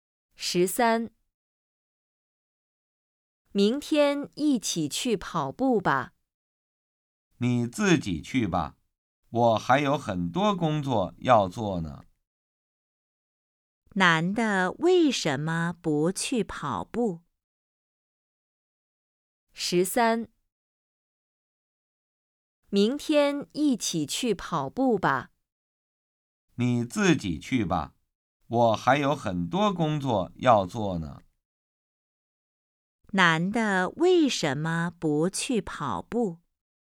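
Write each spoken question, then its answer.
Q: 男的为什么不去跑步?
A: 他还有很多工作要做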